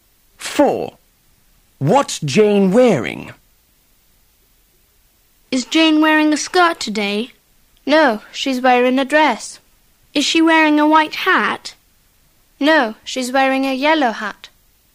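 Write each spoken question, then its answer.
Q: What's Jane wearing?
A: A dress and a yellow hat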